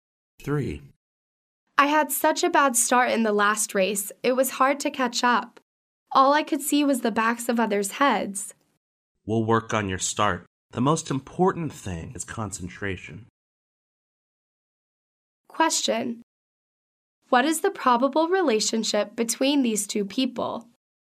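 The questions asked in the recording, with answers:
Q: What is the probable relationship between these two people?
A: Athlete and coach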